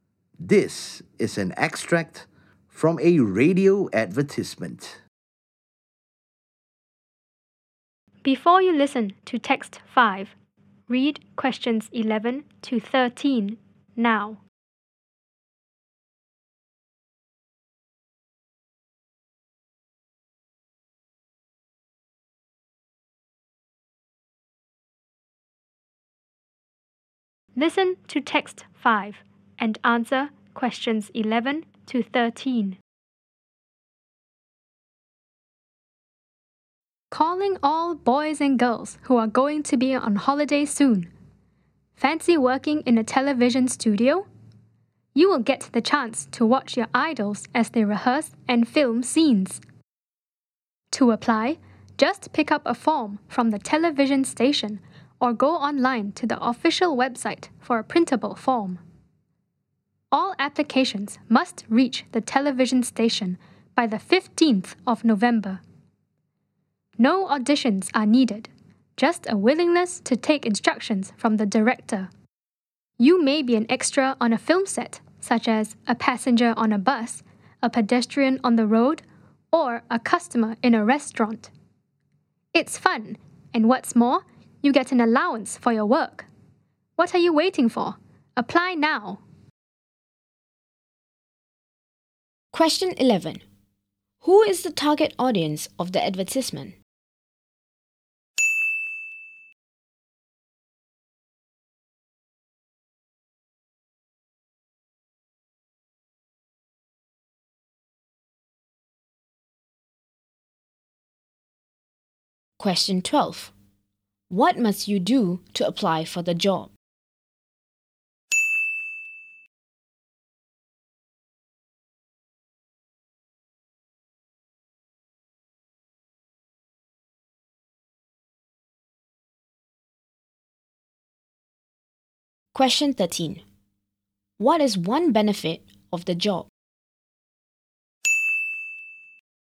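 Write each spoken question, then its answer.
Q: Who is the target audience of the advertisement?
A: Boys and girls who are going to be on holiday soon

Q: What must you do to apply for the job?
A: Get a form from the television station or print one from the official website, and send it in by 15 November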